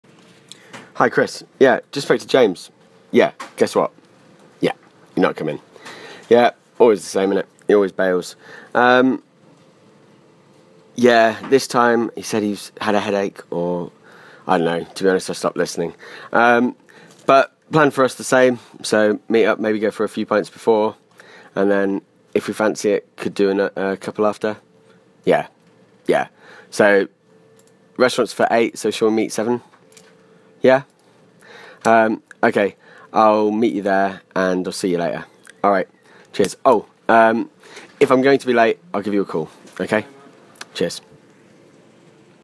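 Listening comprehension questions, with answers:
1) Is this the first time James has let them down?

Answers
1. No, he always bails.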